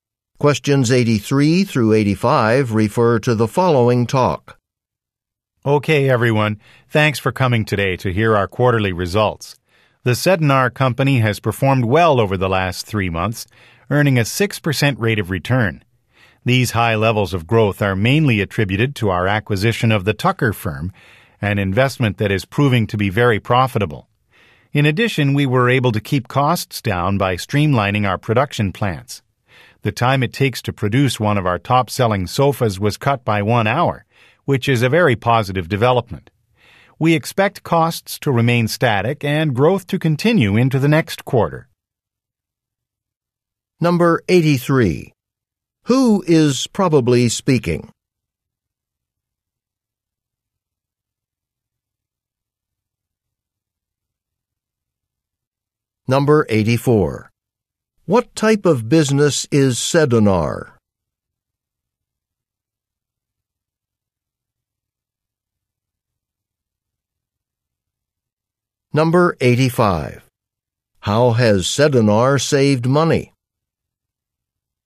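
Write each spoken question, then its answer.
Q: What type of business is Sedinar?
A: A furniture maker

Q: How has Sedinar saved money?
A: By streamlining its production plants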